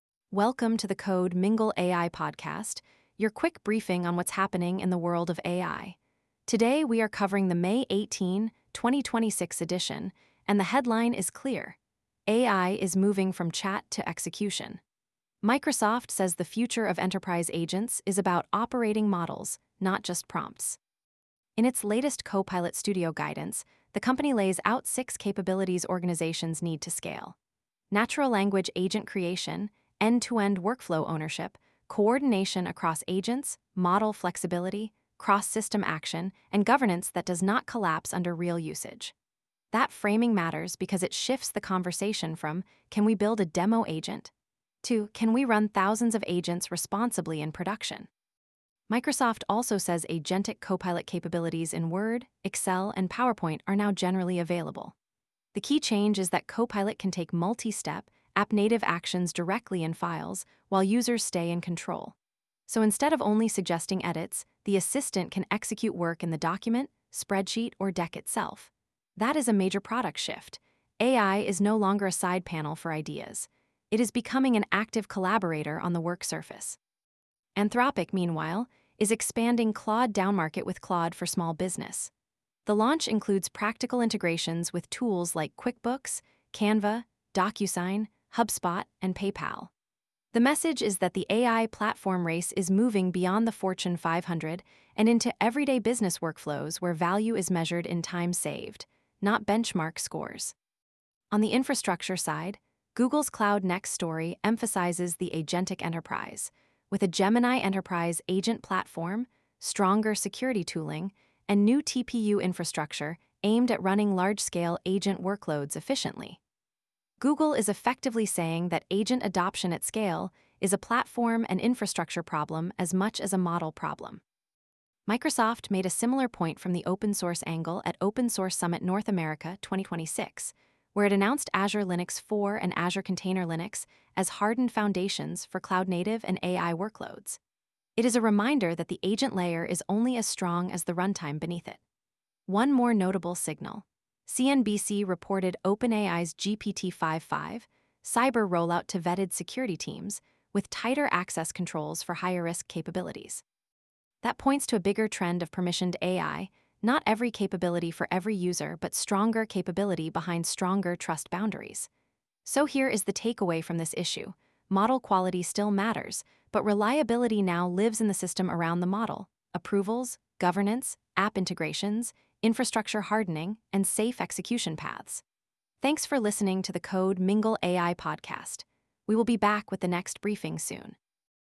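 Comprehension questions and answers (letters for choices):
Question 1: According to Microsoft, what is one core requirement for scaling Copilot Studio agents?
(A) A single model that never changes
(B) Natural-language agent creation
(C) Removing all review controls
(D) Limiting agents to chat-only interfaces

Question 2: What does the new default Copilot experience in Word, Excel, and PowerPoint now allow?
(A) Only text summarization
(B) Multi-step, app-native actions inside documents and presentations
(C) Offline model training inside Office files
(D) Removing user review from edits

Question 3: Which integration was part of Anthropic's Claude for Small Business launch?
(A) QuickBooks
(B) Docker Hub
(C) Figma Fonts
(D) GitHub Actions only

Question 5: Why are Azure Linux 4.0 and Azure Container Linux important in Microsoft's AI story?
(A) They are consumer chat products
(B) They provide a hardened foundation for cloud-native and AI workloads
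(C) They eliminate the need for models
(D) They are only for gaming PCs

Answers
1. B
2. B
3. A
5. B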